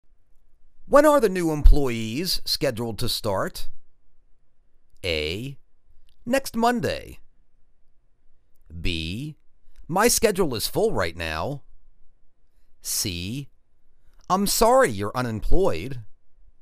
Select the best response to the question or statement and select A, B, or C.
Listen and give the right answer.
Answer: Next Monday.